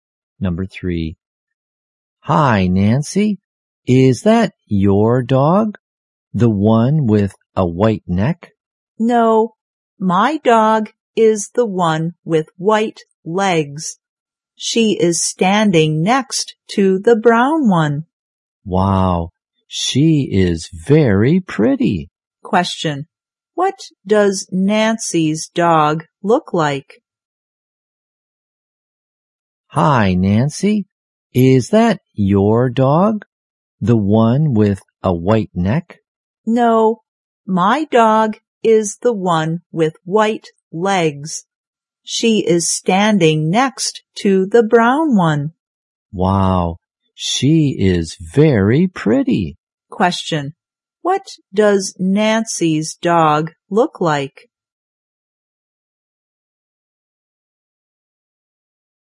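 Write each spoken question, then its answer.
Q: what does Nancy's dog look like?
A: She has white legs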